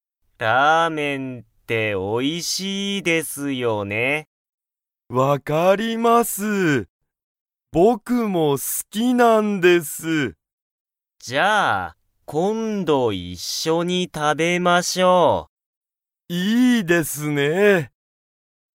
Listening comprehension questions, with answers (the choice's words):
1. 山岡(やまおか)さんは、ラーメンが好(す)きですか?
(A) はい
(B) いいえ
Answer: はい

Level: Level 1